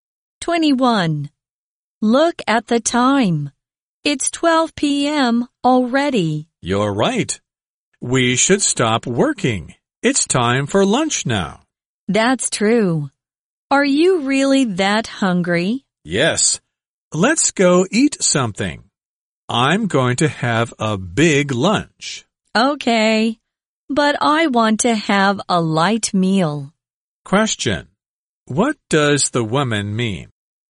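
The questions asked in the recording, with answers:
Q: What does the woman mean?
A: She wants to have a light meal for lunch.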